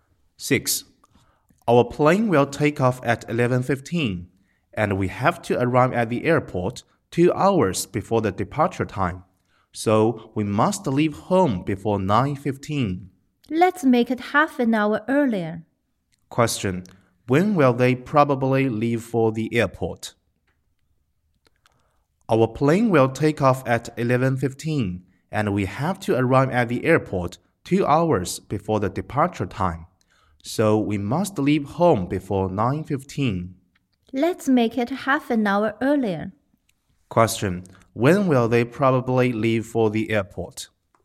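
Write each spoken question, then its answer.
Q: When will they probably leave for the airport?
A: At 8:45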